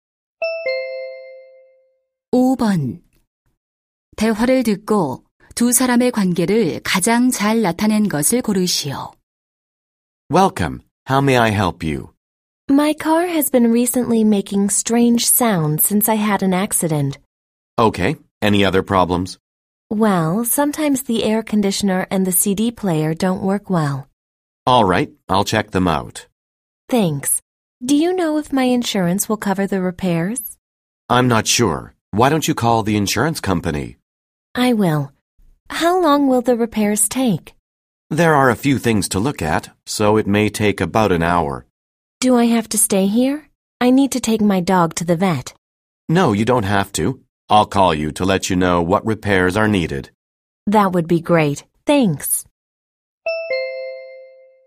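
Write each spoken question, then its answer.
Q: 대화를 듣고 두 사람의 관계를 가장 잘 나타낸 것을 고르시오.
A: 고객 - 자동차 정비사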